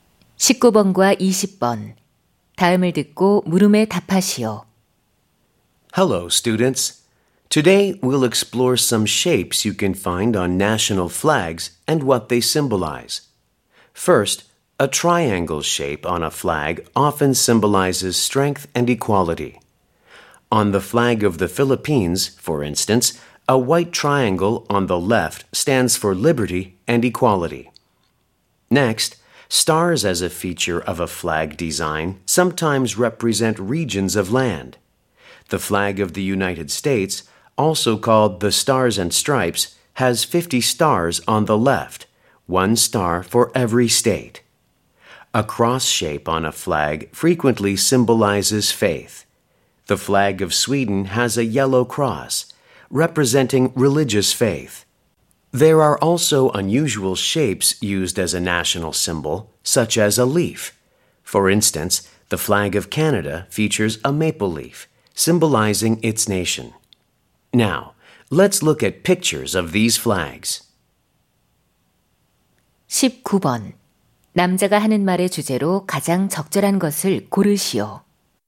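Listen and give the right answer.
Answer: 국기에 있는 모양들과 그 상징적 의미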